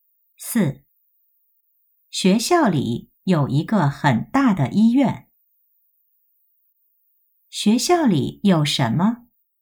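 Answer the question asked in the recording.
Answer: 医院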